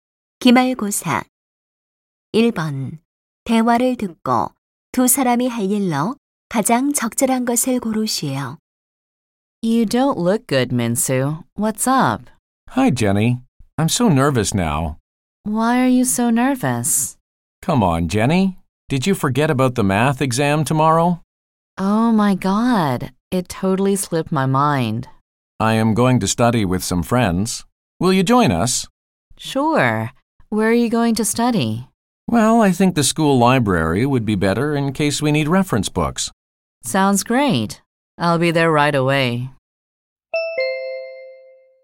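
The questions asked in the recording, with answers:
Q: 대화를 듣고 두 사람이 할 일로 가장 적절한 것을 고르시오.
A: 학교 도서관에서 친구들과 수학 시험 공부하기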